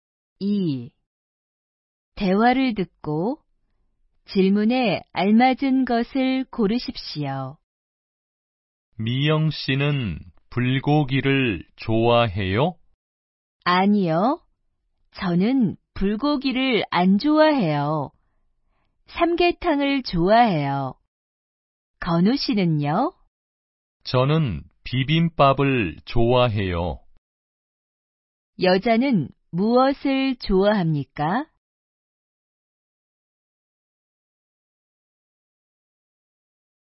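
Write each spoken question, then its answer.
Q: 여자는 무엇을 좋아합니까?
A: 삼계탕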